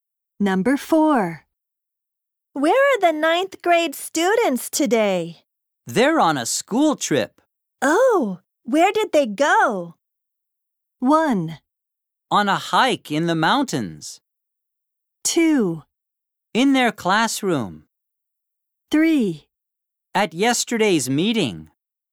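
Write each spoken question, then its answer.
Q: Oh, where did they go?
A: 1: On a hike in the mountains.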